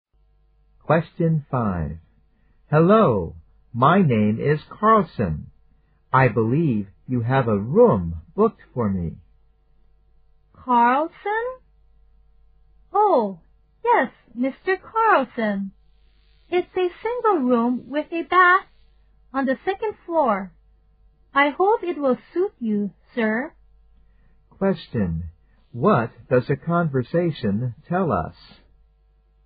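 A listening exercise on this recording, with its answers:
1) What does the conversation tell us?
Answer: The man reserved a room some time ago.

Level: 大学英语四级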